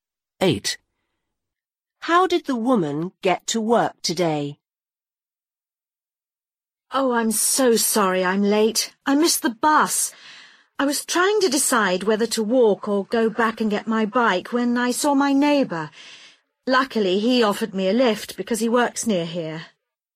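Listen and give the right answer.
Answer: Her neighbour gave her a lift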